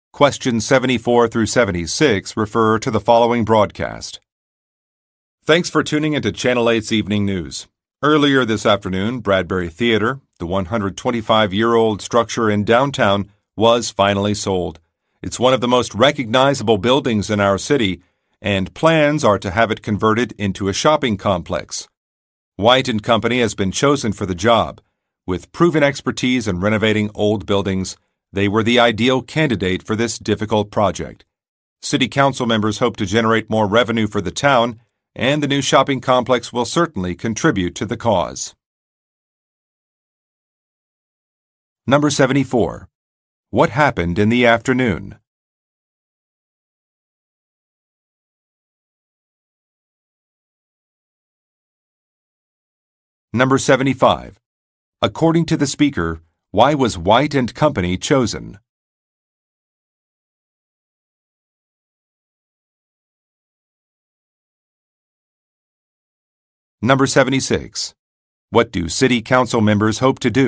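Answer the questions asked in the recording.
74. Bradbury Theater was sold.
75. They have proven expertise in renovating old buildings.
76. Generate more revenue for the town.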